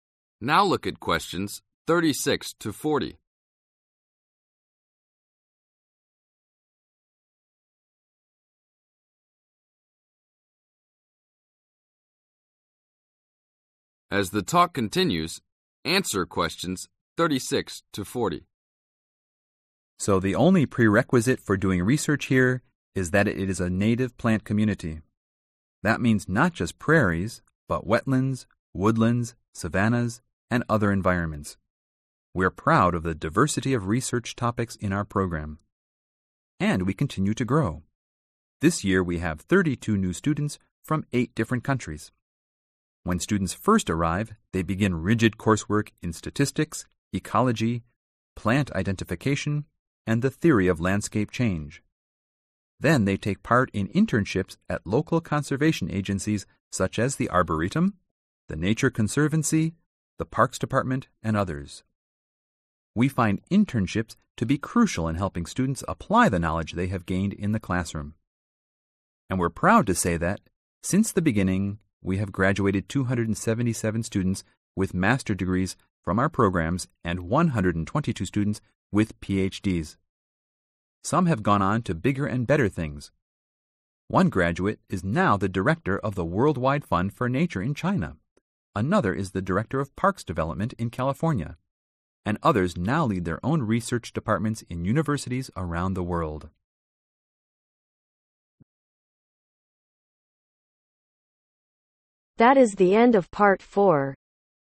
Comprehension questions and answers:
Complete the notes below. Write ONE WORD OR A NUMBER for each answer.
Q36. Coursework in statistics, theory, ecology and (36)............ identification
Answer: Plant

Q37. identification (37)............ help students gain practical experience.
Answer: Internships

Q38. Has so far granted (38)............ Masters Degrees and 122 Ph.D.'s.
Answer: 277

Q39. One former student is now the (39)............ of the World Wide fund for Nature,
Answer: Director

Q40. while many others continue to conduct (40)............ in their own university programmers.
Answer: Research